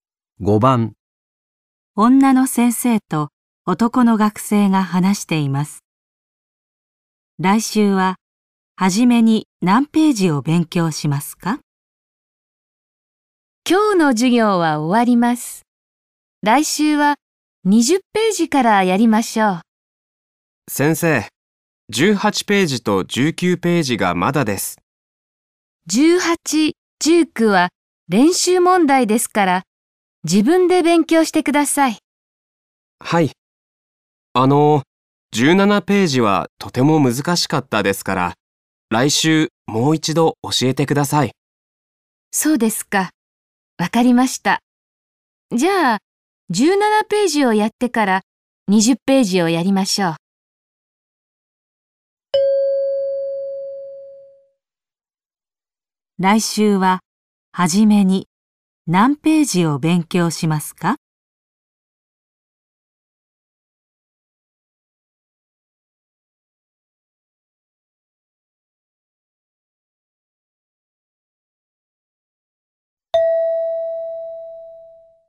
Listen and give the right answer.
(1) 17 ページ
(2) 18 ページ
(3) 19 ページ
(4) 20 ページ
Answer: (1) 17 ページ

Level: N5 Listening · Test 3